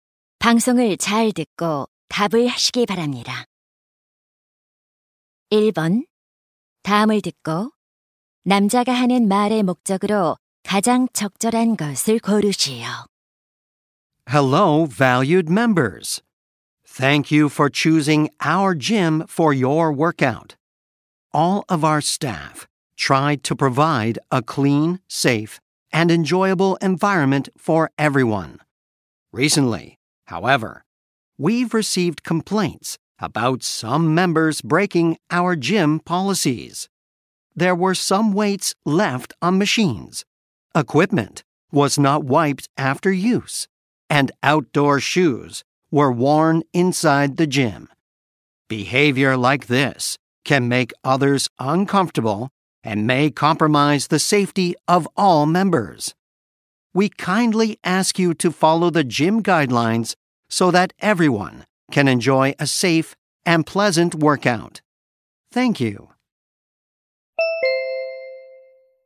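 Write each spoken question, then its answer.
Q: 다음을 듣고 남자가 하는 말의 목적으로 가장 적절한 것을 고르시오.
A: 체육관 이용 수칙을 지켜 달라고 요청하려고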